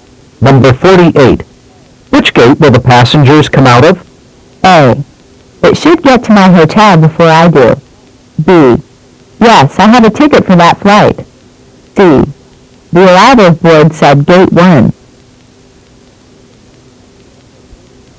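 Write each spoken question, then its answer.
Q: Which gate will the passengers come out of?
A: C: The arrival board said gate 1.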